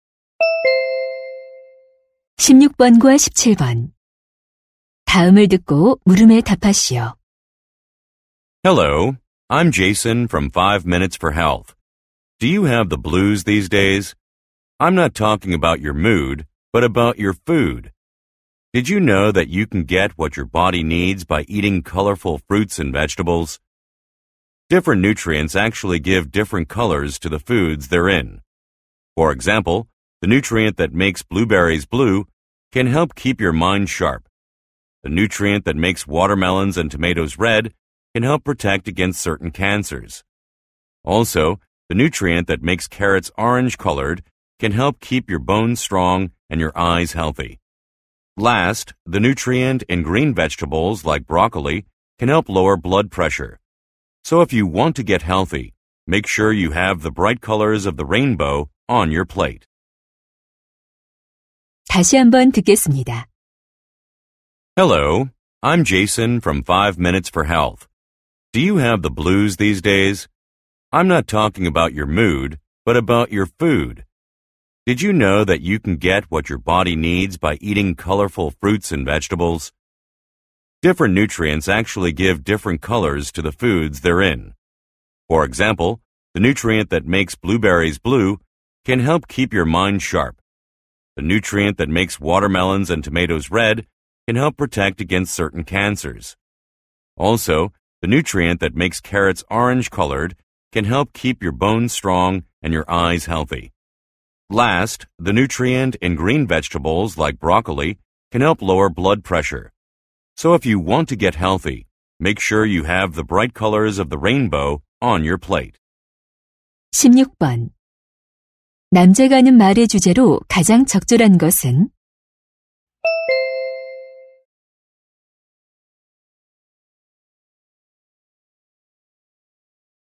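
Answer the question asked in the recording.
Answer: 다양한 색깔의 과일과 채소가 건강에 주는 이점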